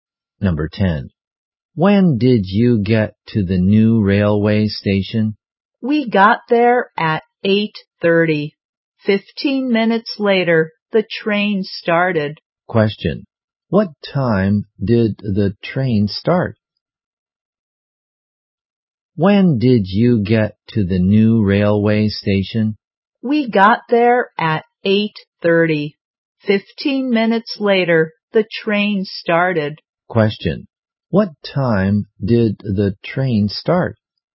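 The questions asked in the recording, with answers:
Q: What time did the train start?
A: At 8:45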